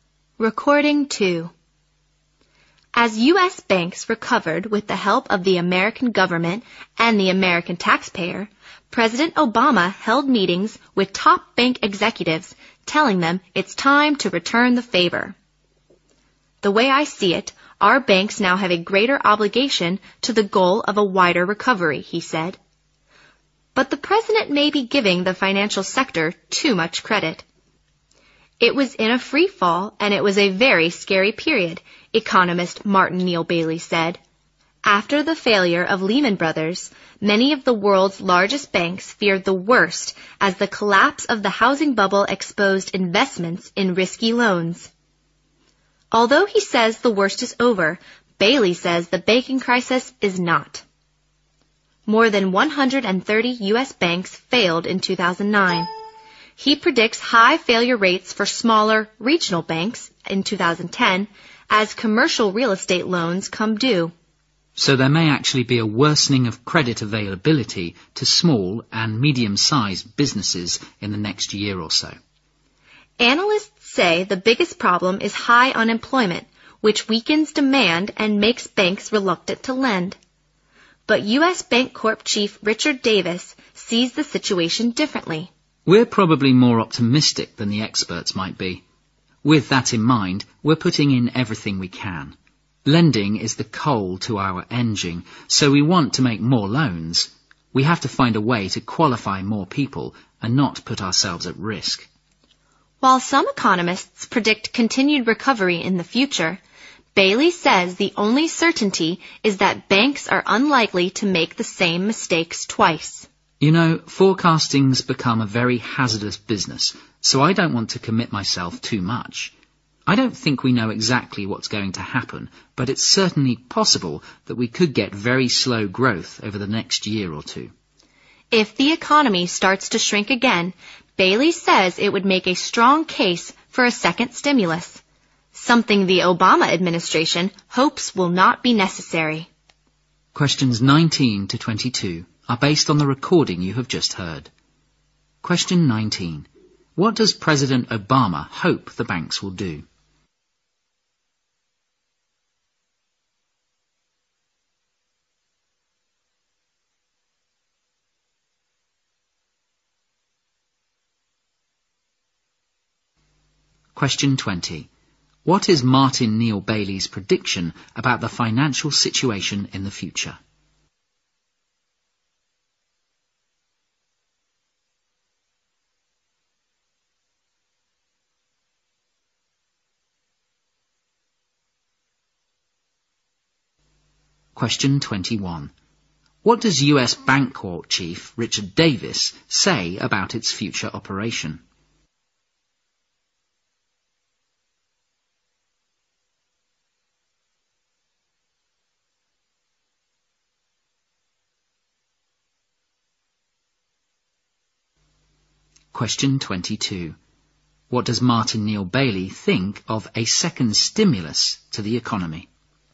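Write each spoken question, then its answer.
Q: What does President Obama hope the banks will do?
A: Help the wider economic recovery (return the favor)

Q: What is Martin Neil Bailey's prediction about the financial situation in the future?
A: More small regional banks will fail and credit may get worse

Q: What does U.S.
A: It will make more loans while avoiding risk

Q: What does Martin Neil Bailey think of a second stimulus to the economy?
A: It would be needed if the economy starts to shrink again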